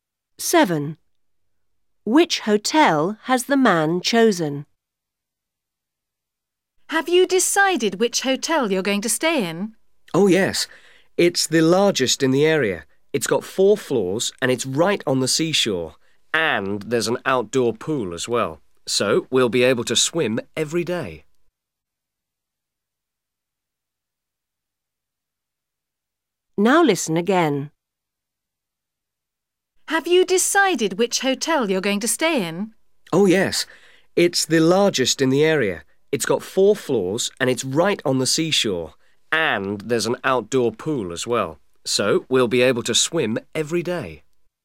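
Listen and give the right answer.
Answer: The largest one, with four floors, on the seashore, with an outdoor pool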